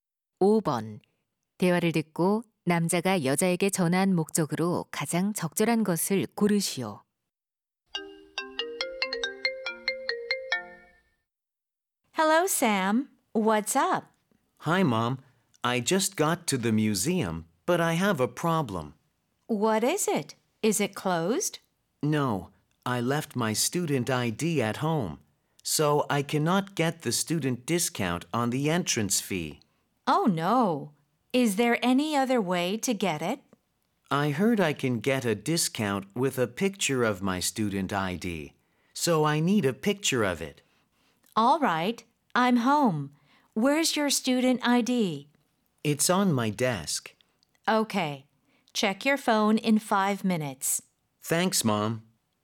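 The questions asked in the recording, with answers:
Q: 대화를 듣고 남자가 여자에게 전한 목적으로 가장 적절한 것을 고르시오.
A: 학생증 사진을 보내 달라고 부탁하려고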